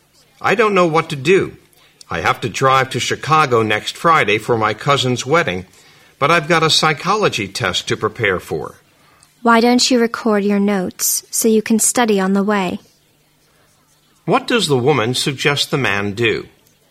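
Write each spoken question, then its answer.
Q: What does the woman suggest the man do?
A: Record his notes so he can study while driving to Chicago.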